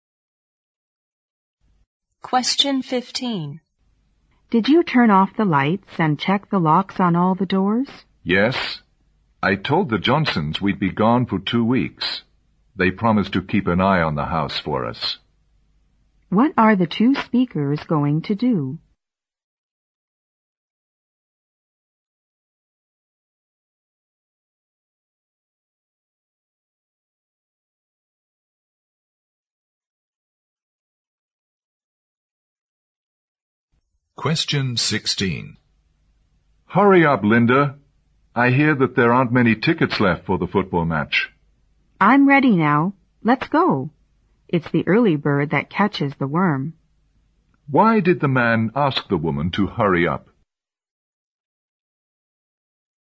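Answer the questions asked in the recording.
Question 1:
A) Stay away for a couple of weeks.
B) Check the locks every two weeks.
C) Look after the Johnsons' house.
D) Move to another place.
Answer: A) Stay away for a couple of weeks.
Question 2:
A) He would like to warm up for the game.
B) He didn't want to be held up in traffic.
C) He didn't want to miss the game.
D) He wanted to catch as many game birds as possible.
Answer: C) He didn't want to miss the game.

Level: 六级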